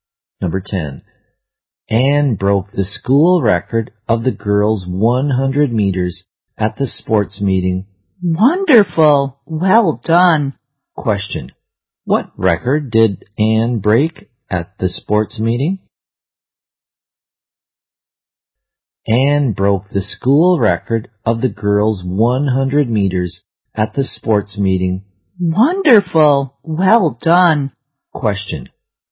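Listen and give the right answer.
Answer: The school record of the girls' 100 meters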